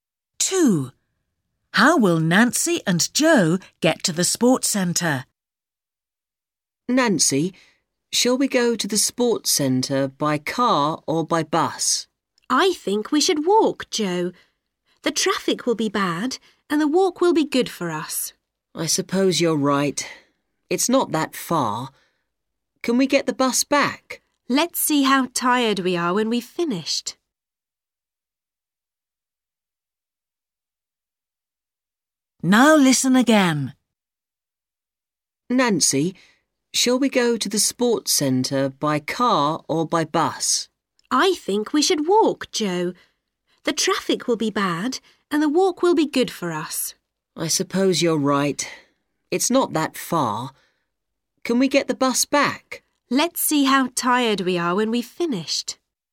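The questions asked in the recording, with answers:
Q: How will Nancy and Joe get to the sports centre?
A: walk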